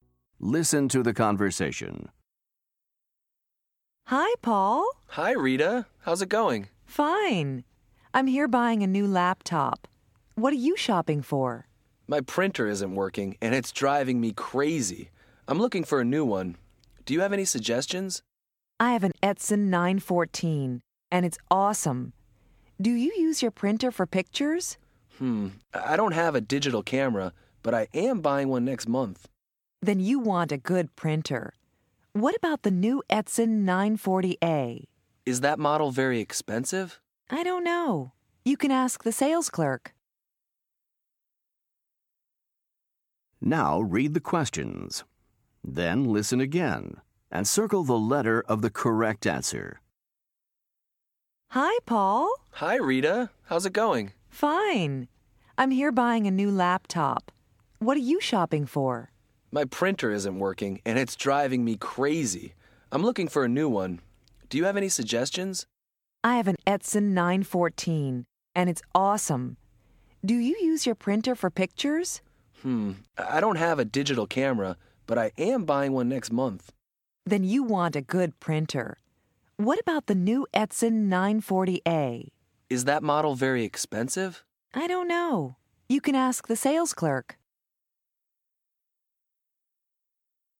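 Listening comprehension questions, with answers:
Listen to the conversation. Choose the correct answer for each question.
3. What is Rita shopping for ?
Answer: a new laptop

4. Why is Paul shopping for a printer?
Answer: His printer isn't working.

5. What is Paul buying next month?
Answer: a digital camera

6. What does Rita say about the price of the printer she recommends?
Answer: She doesn't know; he can ask the sales clerk.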